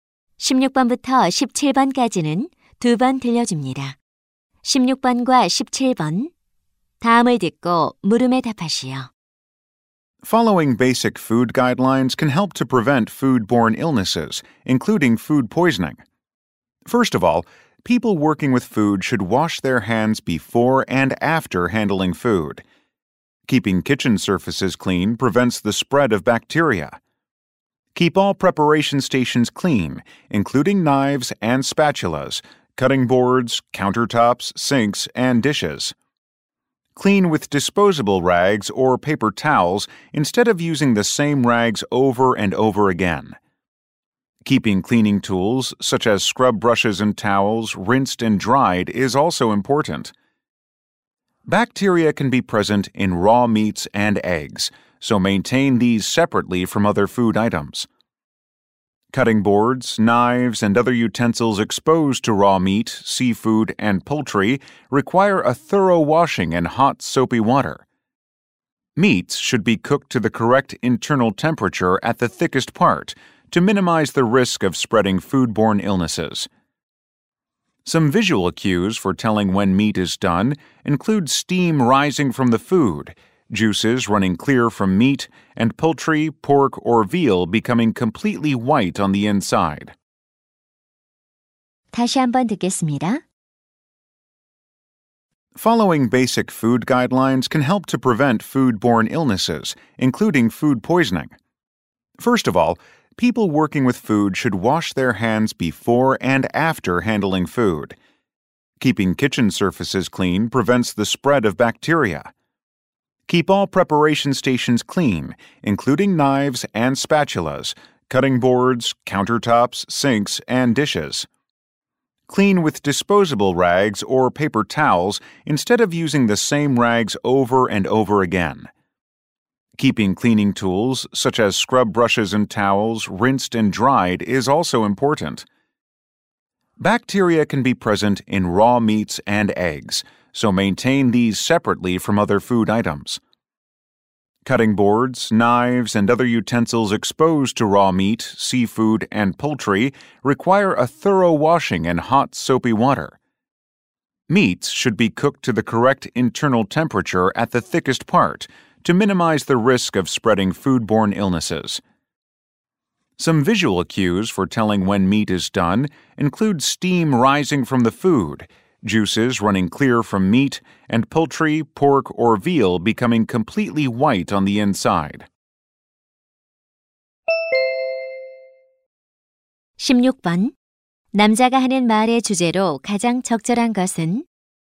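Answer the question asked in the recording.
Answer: 식중독 등 식품 매개 질병을 예방하는 방법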